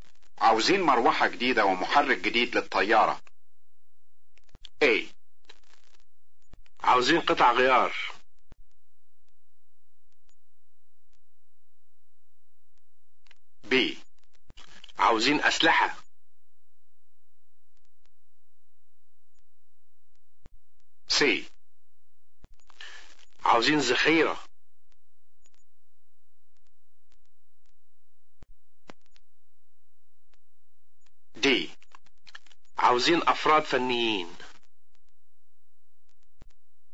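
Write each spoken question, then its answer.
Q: عاوزين مروحة جديدة ومحرك جديد للطيارة.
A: A: عاوزين قطع غيار.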